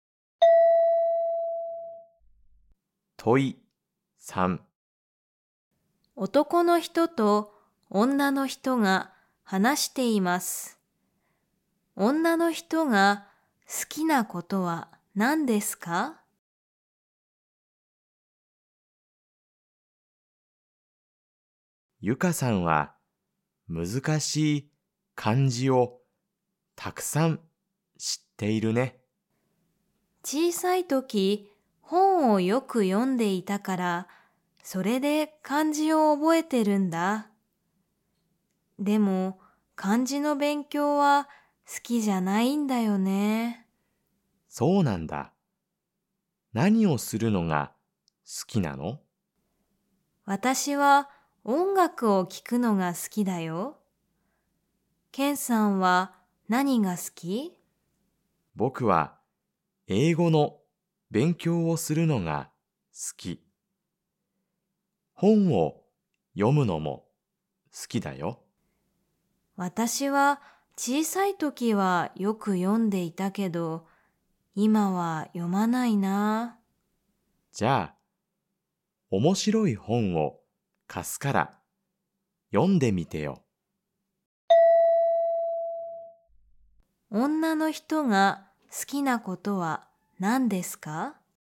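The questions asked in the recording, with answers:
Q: 女の人が好きなことは何ですか?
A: 音楽を聴くこと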